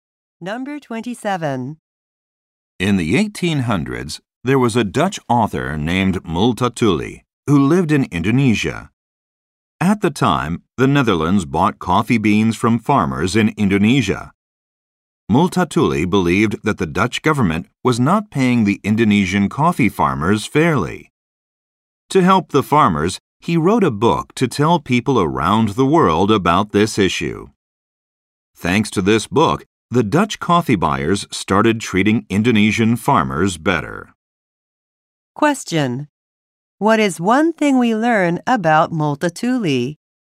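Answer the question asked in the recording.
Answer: He wrote a book to help Indonesian coffee farmers.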